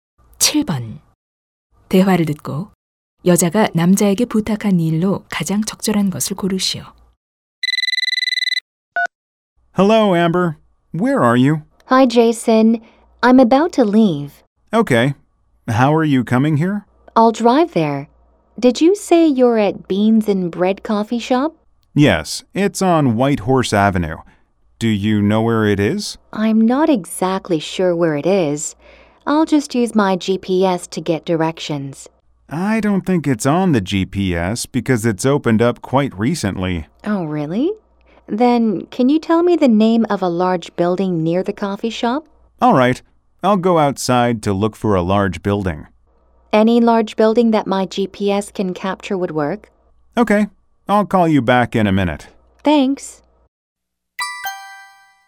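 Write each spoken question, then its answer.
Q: 대화를 듣고 여자가 남자에게 부탁한 일로 가장 적절한 것을 고르시오.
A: 커피숍 근처의 큰 건물 이름을 알려 주기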